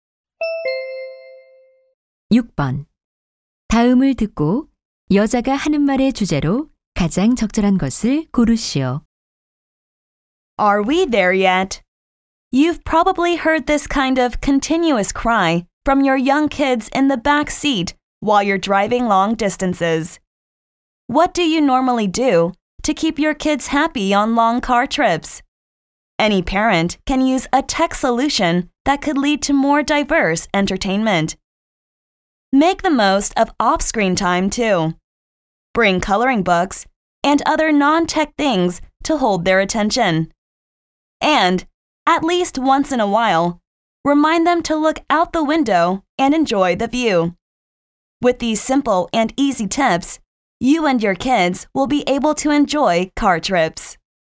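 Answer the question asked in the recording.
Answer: 장거리 자동차 여행에서 아이들을 즐겁게 해 주는 방법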